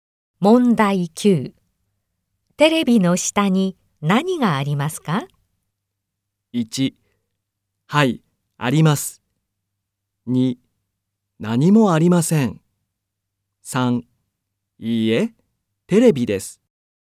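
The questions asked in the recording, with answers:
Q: テレビの下に何がありますか?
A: 2: 何もありません。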